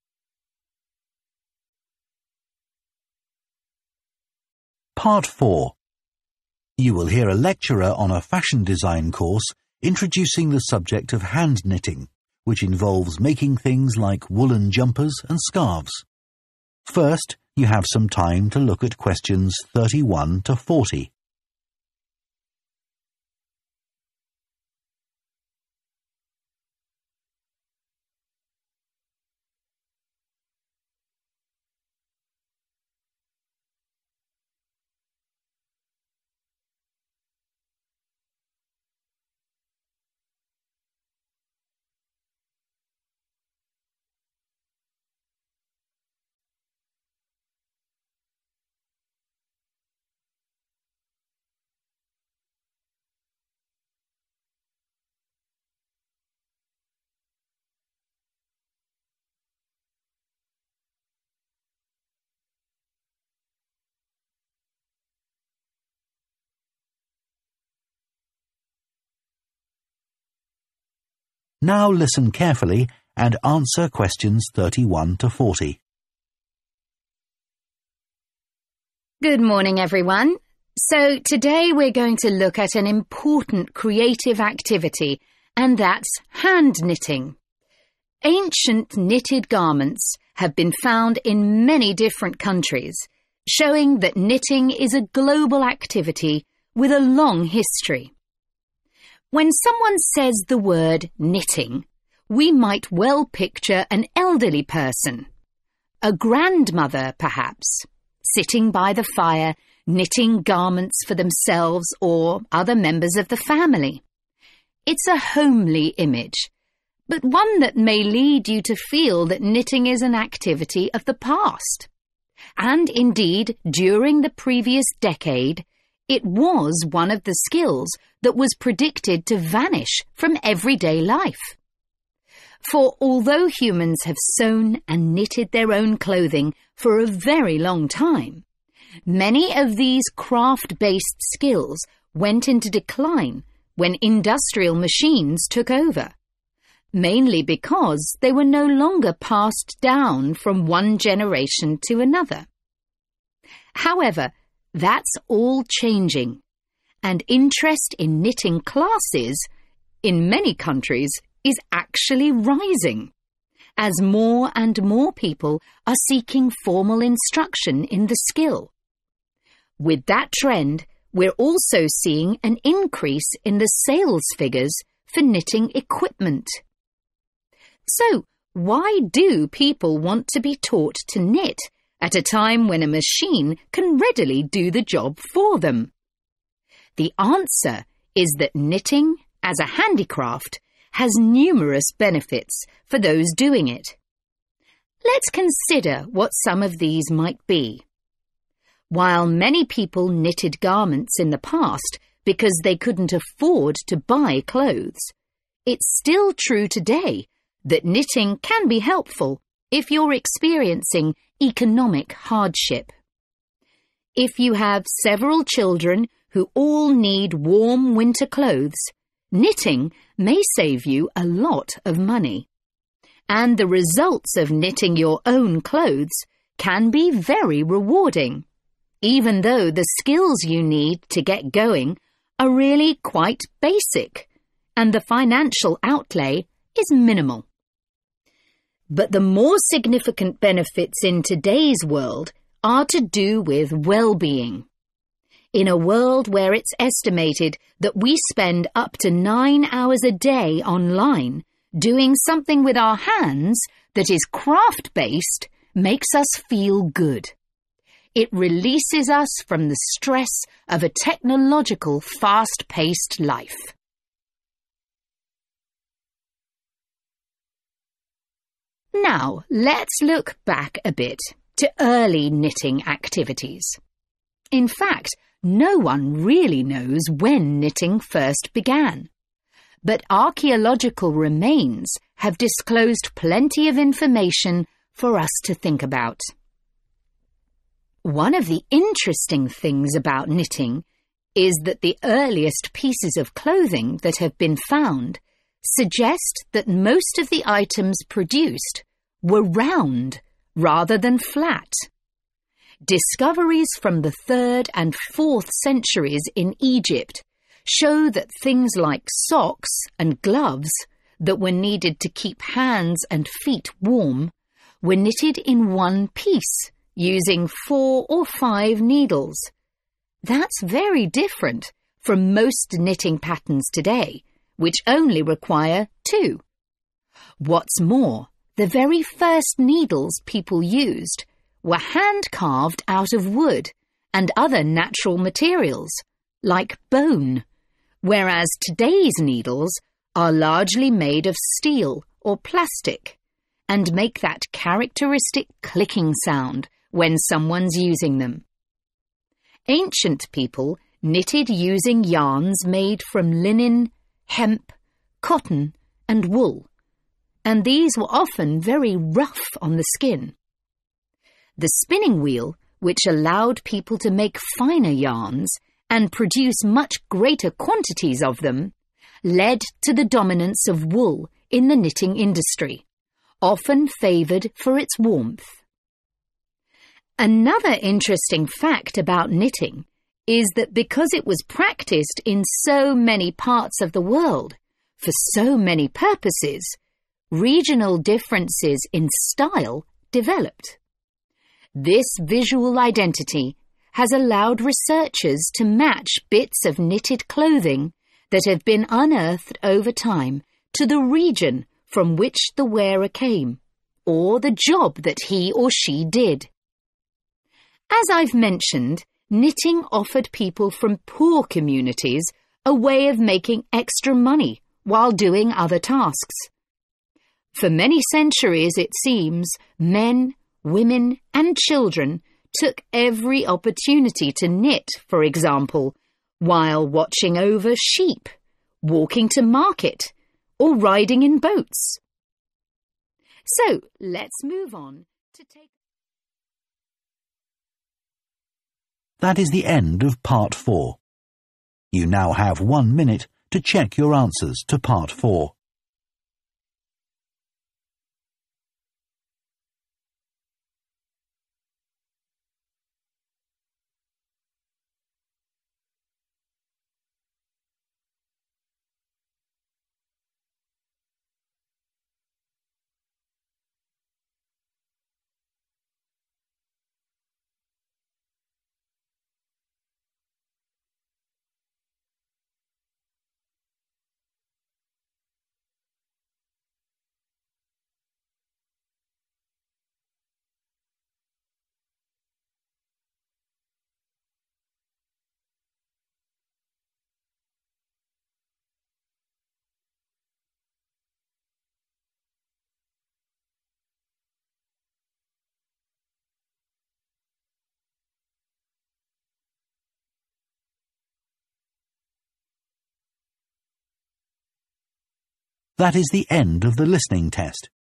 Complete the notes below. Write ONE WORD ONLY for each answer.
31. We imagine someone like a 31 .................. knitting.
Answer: grandmother

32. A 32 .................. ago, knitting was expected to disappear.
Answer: decade

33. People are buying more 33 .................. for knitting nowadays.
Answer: equipment

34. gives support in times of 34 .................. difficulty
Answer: economic

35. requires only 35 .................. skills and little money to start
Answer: basic

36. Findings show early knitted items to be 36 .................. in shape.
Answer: round

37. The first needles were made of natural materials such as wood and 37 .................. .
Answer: bone

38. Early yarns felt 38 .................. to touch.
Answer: rough

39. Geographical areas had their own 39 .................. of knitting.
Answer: style

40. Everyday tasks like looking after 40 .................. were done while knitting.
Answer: sheep